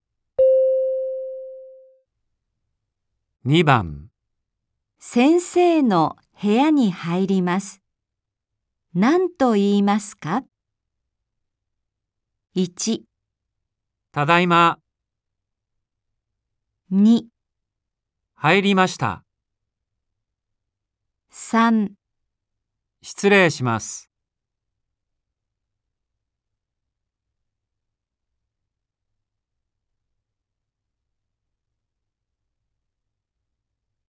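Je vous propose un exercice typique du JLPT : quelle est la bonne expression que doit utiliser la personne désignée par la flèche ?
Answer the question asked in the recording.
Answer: 失礼します。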